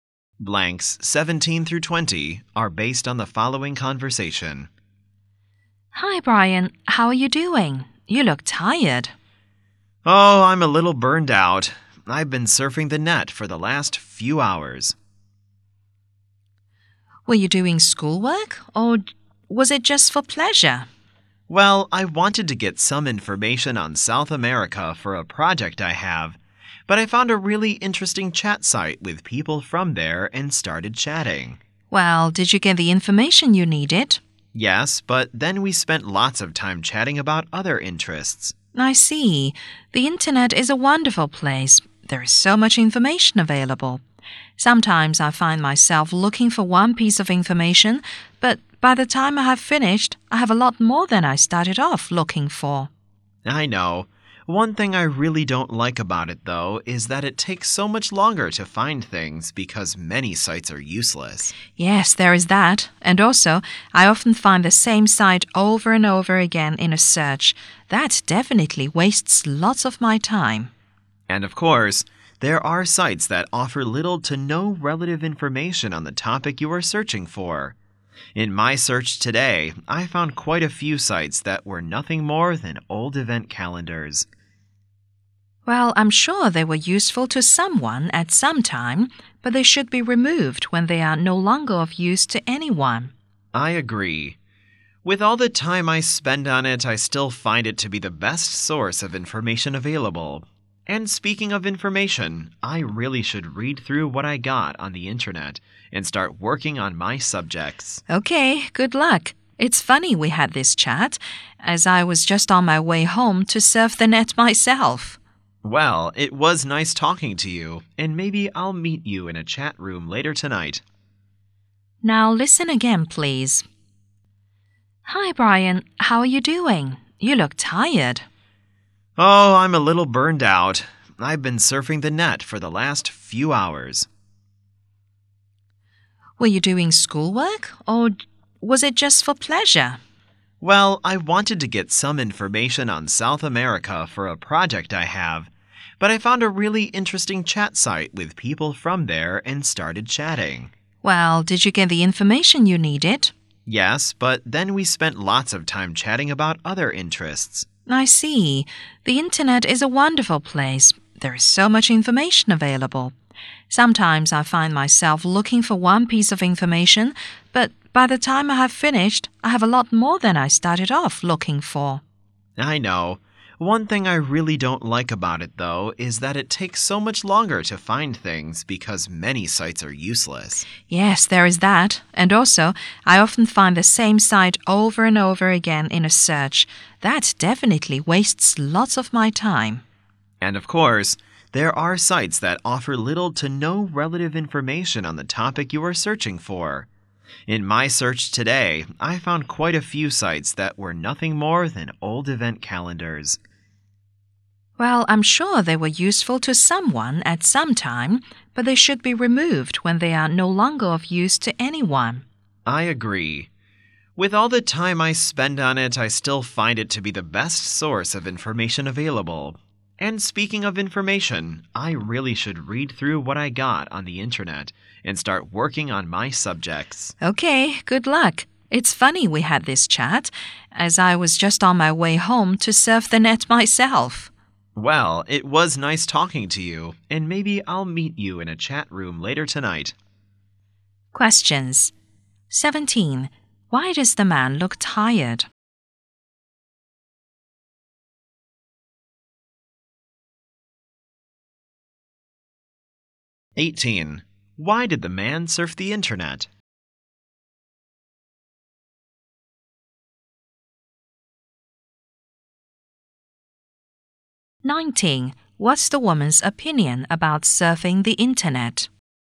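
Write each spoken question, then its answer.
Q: Why does the man look tired?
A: He's been surfing the net for hours

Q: Why did the man surf the internet?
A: To get information on South America for a project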